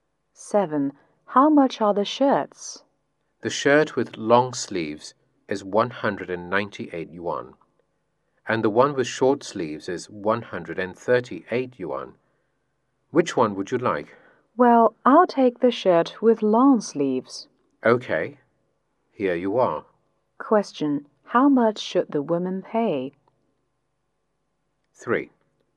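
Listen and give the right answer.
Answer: 198 yuan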